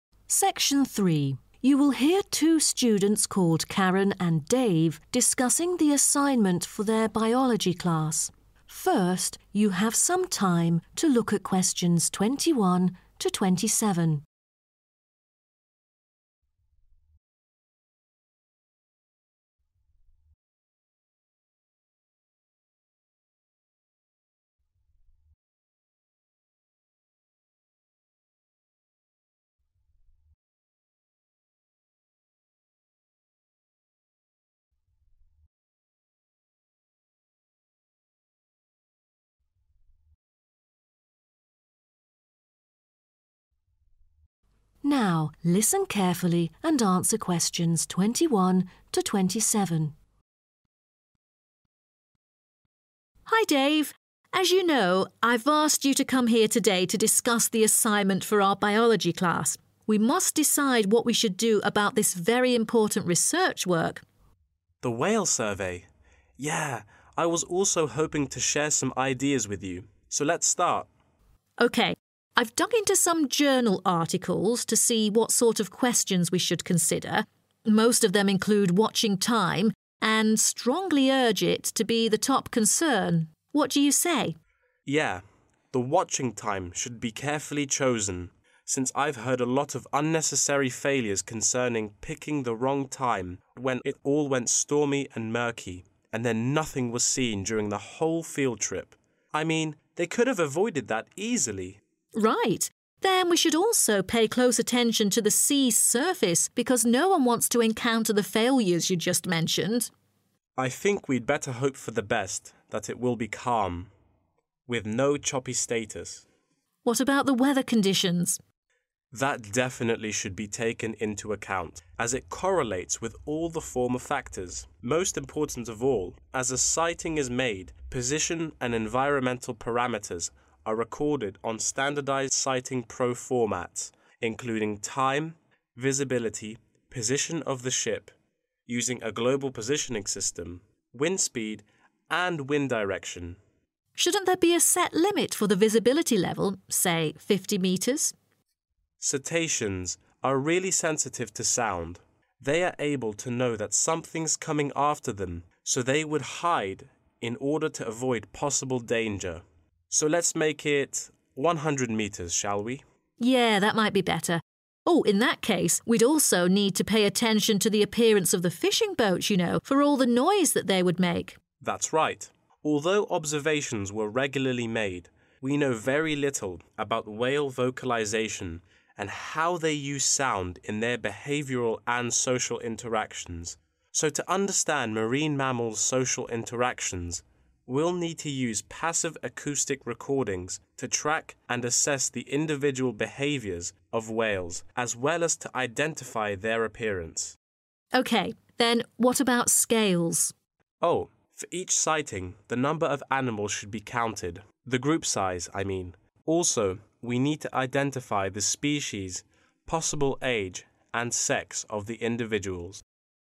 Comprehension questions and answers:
Complete the notes below. Write NO MORE THAN TWO WORDS AND/OR A NUMBER for each answer.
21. The 21....................... should be carefully chosen.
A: Watching time

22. State of the sea : 22.......................or choppy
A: Calm

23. And state of 23.......................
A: Weather

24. Visiility: 24.......................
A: 100 metres/ 100 meters

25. Details in need of attention: the appearance of 25.......................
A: fishing boats

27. scales: the 27.......................and species, the possible age etc.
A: Group Size